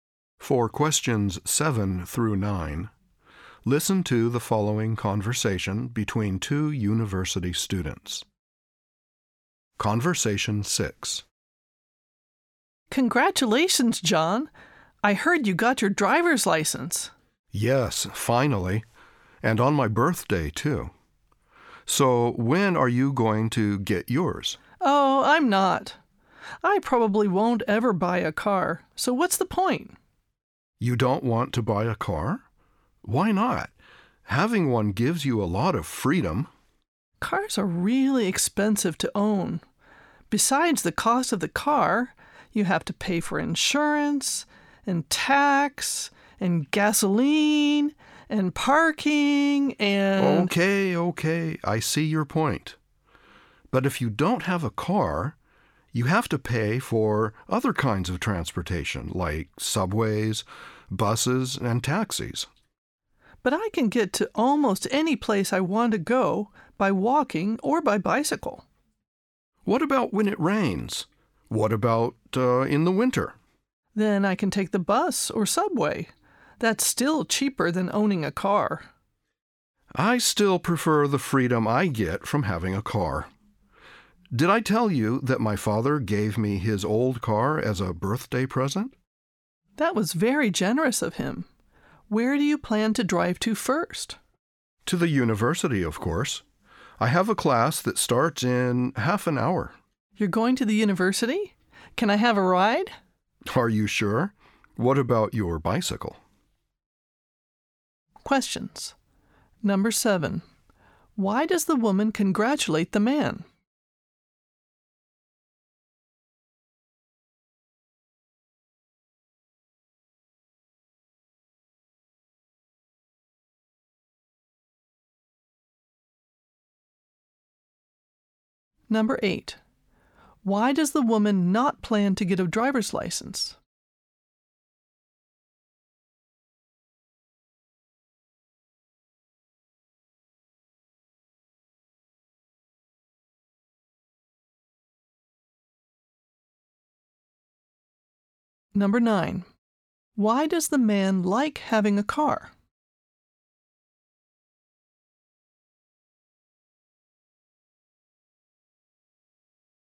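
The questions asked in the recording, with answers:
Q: Why does the woman congratulate the man?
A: He got his driver's license

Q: Why does the woman not plan to get a driver's license?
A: She probably won't buy a car because cars are expensive to own

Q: Why does the man like having a car?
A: It gives him freedom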